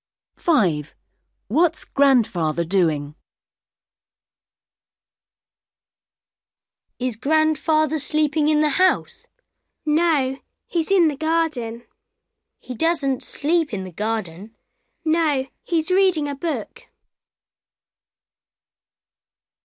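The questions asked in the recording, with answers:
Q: What's Grandfather doing?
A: reading a book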